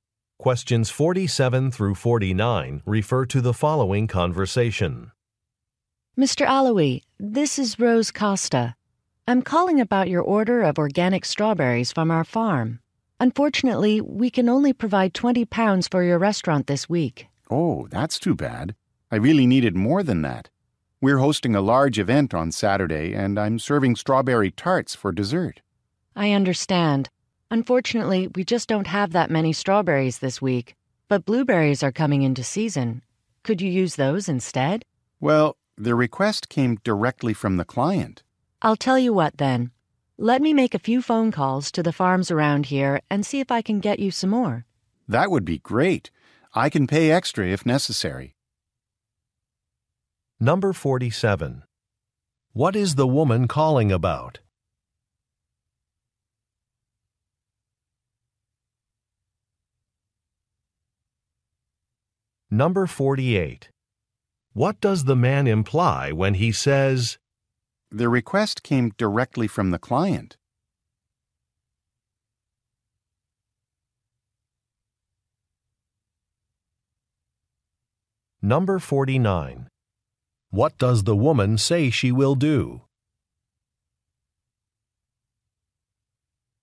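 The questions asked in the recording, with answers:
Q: What is the woman calling about?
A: His strawberry order

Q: What does the man imply when he says,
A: He cannot substitute blueberries

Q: What does the woman say she will do?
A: Call other farms to get more strawberries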